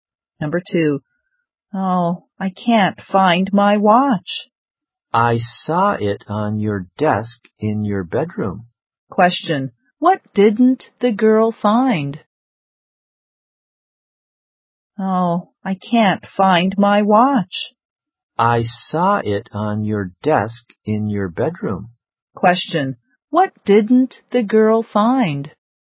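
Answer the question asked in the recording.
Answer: Her watch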